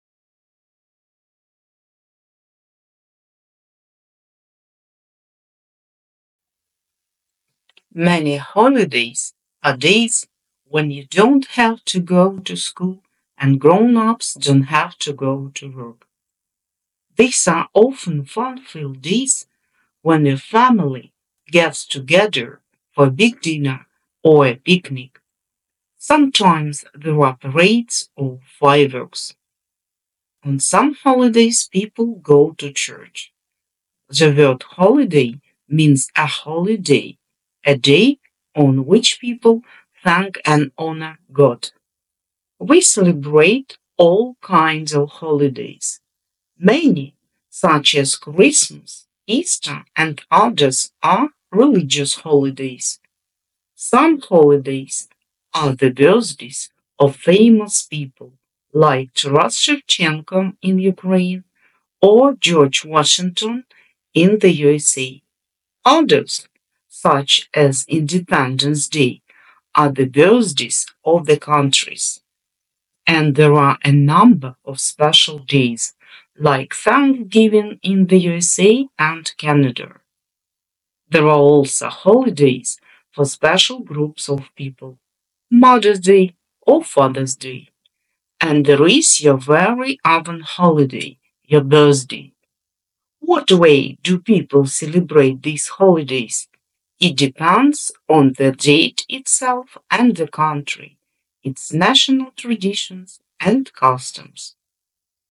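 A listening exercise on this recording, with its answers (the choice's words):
III Choose a correct answer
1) When people don ́t have to go to work?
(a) People don't have to go to work on many holidays;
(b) People don't have to go to work on religious holidays;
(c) People don't have to go to work on all holidays.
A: People don't have to go to work on many holidays;

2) Where do people go on some holidays?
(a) People go to the seaside;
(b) People go to churches;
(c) People go to their work.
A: People go to churches;

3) What are the religious holidays?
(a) Christmas and Mother ́s Day are religious holidays;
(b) Christmas and Father ́s Day are religious holidays;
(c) Christmas and Easter are religious holidays.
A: Christmas and Easter are religious holidays.

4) Where do people celebrate Thanksgiving Day?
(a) People celebrate Thanksgiving Day in the USA;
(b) People celebrate Thanksgiving Day in Canada;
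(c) People celebrate Thanksgiving Day in the USA and Canada.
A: People celebrate Thanksgiving Day in the USA and Canada.

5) What is your own holiday?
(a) Your own holiday is Easter;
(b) Your own holiday is birthday;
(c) Your own holiday is Christmas.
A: Your own holiday is birthday;

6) What way do people celebrate holidays?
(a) It depends on the date, customs and traditions;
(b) It depends on people;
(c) It depends on the date, country, traditions and customs.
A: It depends on the date, country, traditions and customs.

II Complete the sentences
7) On holidays people...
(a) Have to go to work;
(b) Don ́t have to go to work;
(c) Go to work.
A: Don ́t have to go to work;

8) Sometimes on holidays there are...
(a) Fireworks;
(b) Parades;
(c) Fireworks and parades.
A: Fireworks and parades.

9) We celebrate...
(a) Only religious holidays;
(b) All kinds of holidays;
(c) Winter holidays.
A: All kinds of holidays;

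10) Some holidays are the birthdays of...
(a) People;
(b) Famous people;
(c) Neighbours.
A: Famous people;

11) There are holidays for special ...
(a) Groups ;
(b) Classes;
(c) People.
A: Groups ;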